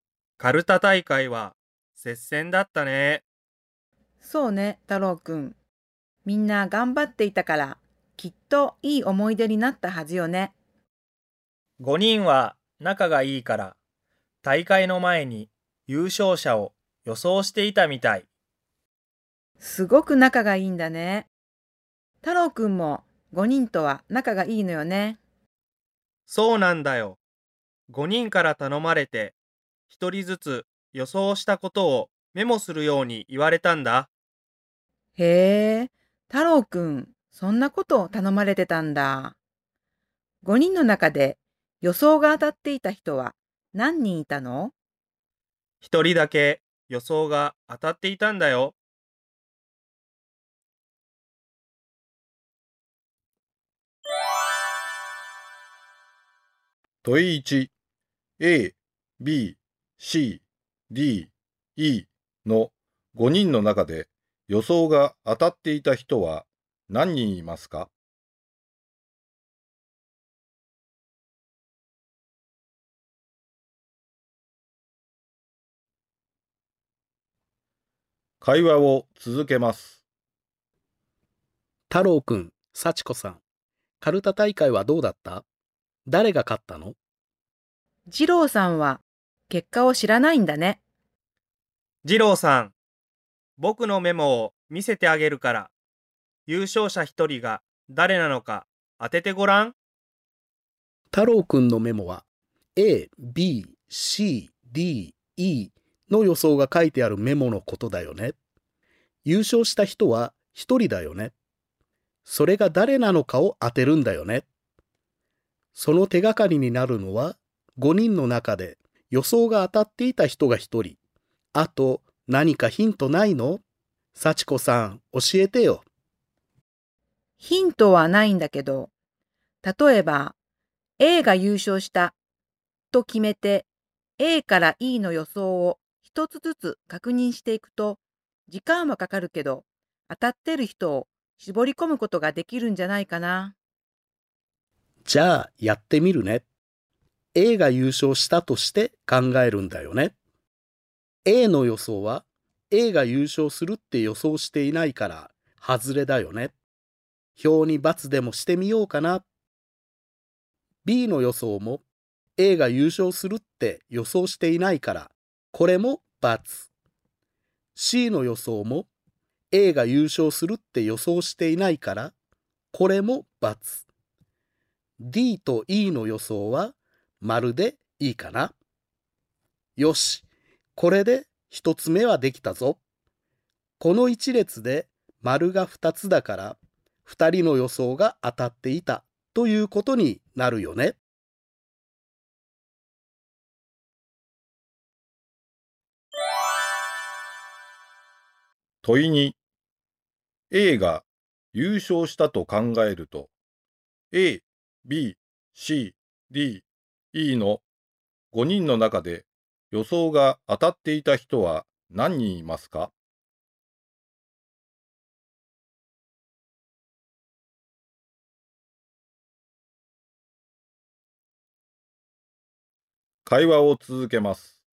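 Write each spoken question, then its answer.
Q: A、B、C、D、E の5人の中で予想が当たっていた人は何人いますか?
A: 1人

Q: A が優勝したと考えると、A、B、C、D、E の5人の中で予想が当たっていた人は何人いますか?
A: 2人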